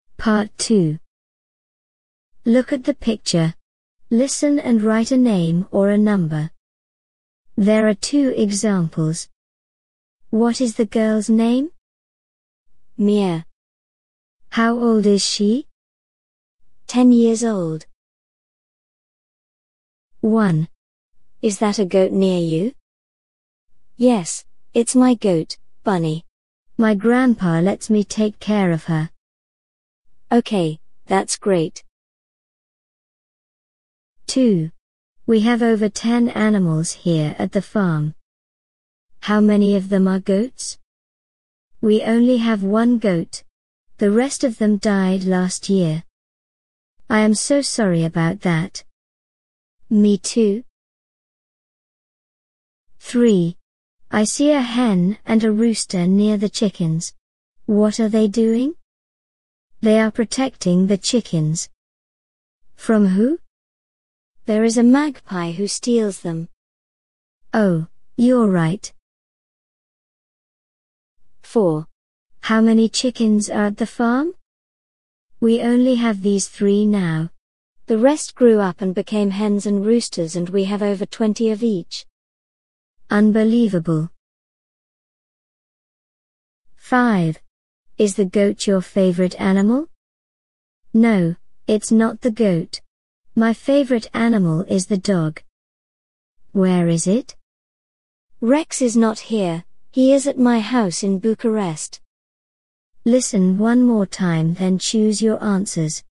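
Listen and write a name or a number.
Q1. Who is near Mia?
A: Bunny

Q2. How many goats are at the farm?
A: 1

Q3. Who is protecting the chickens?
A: a hen and a rooster

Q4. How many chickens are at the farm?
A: 3

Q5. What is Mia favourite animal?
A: the dog

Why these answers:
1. Is that a goat near you? Yes, it's my goat, Bunny. My grandpa lets me take care of her.
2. We only have one goat. The rest of them died last year.
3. I see a hen and a rooster near the chickens. What are they doing? They are protecting the chickens.
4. We only have these 3 now.
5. No, it's not the goat. My favourite animal is the dog.

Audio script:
1. Is that a goat near you?
Yes, it's my goat, Bunny. My grandpa lets me take care of her.
Okay, that's great.
2. We have over 10 animals here at the farm.
How many of them are goats?
We only have one goat. The rest of them died last year.
I am so sorry about that.
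Me too.
3. I see a hen and a rooster near the chickens. What are they doing?
They are protecting the chickens.
From who?
There is a magpie who steals them.
Oh, you're right.
The rest grew up and became hens and roosters and we have over 20 of each.
Unbelievable!
5. Is the goat your favourite animal?
No, it's not the goat. My favourite animal is the dog.
Where is it?
Rex is not here, he is at my house in Bucharest.

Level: Starters Pre-A1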